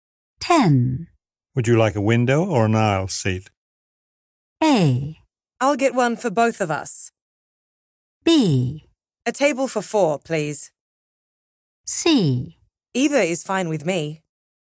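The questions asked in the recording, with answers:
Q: Would you like a window or an aisle seat?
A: C: Either is fine with me.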